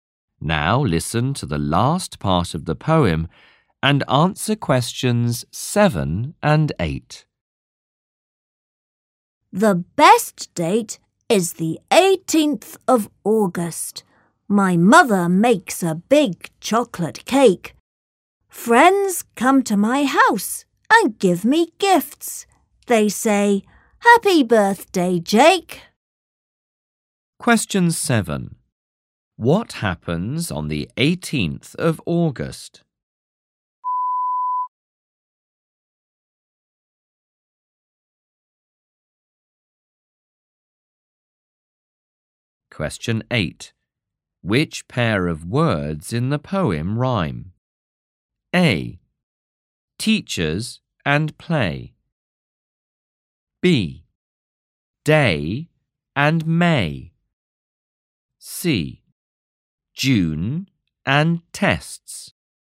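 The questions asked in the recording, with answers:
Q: What happens on the 18th of August?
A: Jake's birthday

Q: Which pair of words in the poem rhyme?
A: B: Day and May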